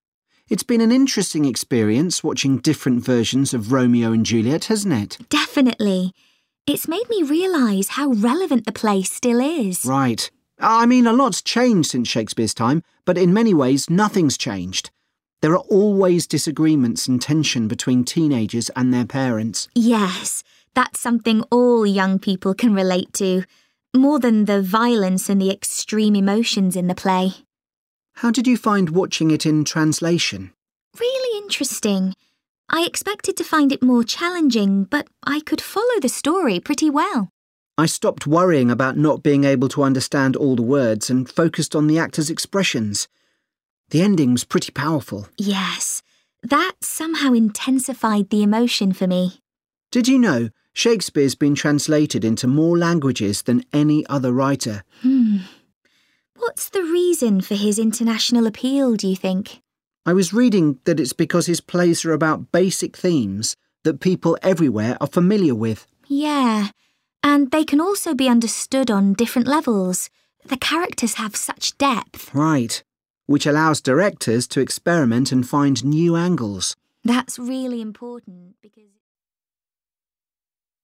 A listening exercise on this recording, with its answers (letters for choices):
Choose the correct letter, A, B or C.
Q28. The students think the story of Romeo and Juliet is still relevant for young people today because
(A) it illustrates how easily conflict can start.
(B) it deals with problems that families experience.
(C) it teaches them about relationships.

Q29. The students found watching Romeo and Juliet in another language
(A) frustrating.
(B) demanding.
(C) moving.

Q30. Why do the students think Shakespeare's plays have such international appeal?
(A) The stories are exciting.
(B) There are recognisable characters.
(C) They can be interpreted in many ways.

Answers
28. B
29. C
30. C